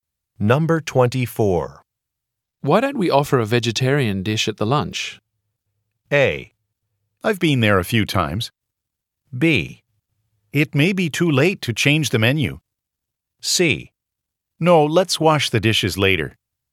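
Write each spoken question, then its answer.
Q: Why don't we offer a vegetarian dish at the lunch?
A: B: It may be too late to change the menu.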